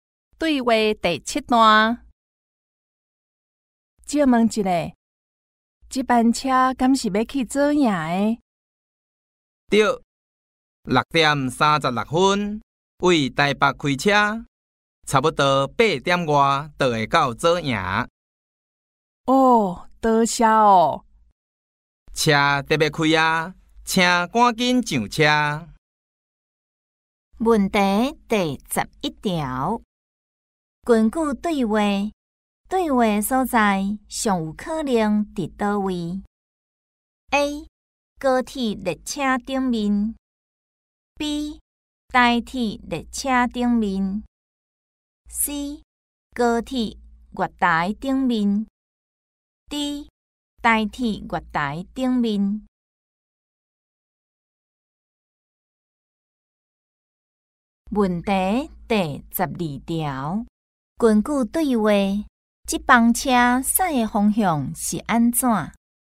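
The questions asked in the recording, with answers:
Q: 根据对话,这班车驶的方向是安怎 ?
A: C: 落南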